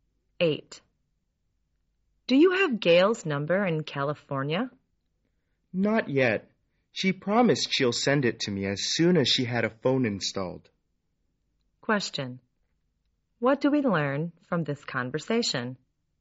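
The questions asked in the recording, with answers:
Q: What do we learn from this conversation?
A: Gail hasn't had a phone installed yet, so he doesn't have her number.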